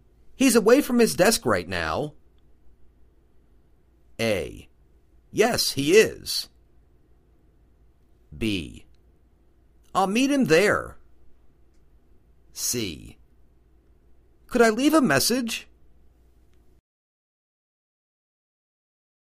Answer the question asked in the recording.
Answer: Could I leave a message?